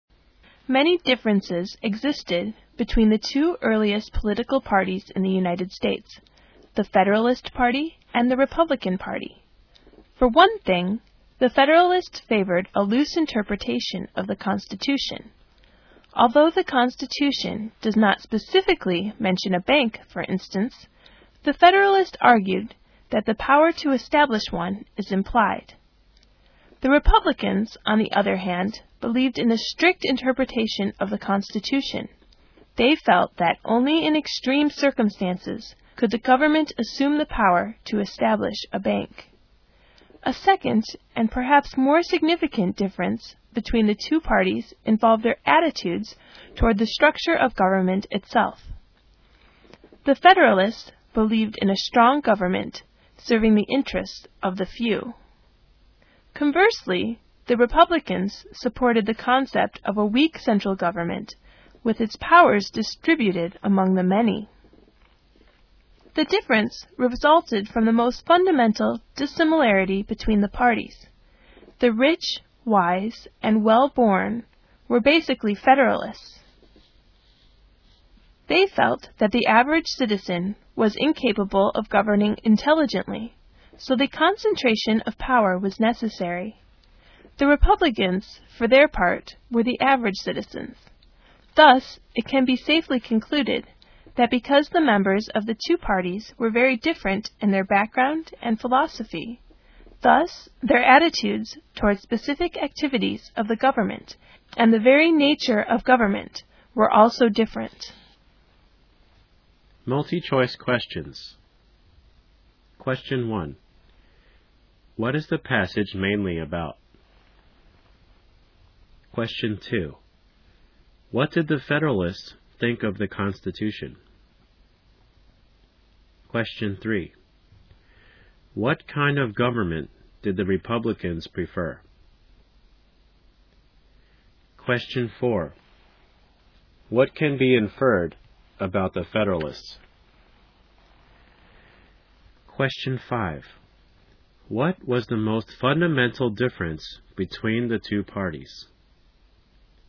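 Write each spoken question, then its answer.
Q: What is the passage mainly about?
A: The differences between the Federalist Party and the Republican Party, the two earliest US political parties

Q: What did the Federalists think of the Constitution?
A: It should be interpreted loosely, so powers such as setting up a bank are implied

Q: What kind of government did the Republicans prefer?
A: A weak central government with its powers spread among the many

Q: What was the most fundamental difference between the two parties?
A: The members' backgrounds: Federalists were the rich, wise and well-born, while Republicans were average citizens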